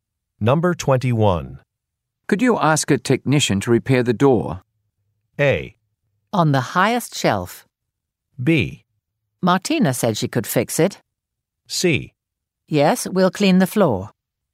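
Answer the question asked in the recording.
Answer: B: Martina said she could fix it.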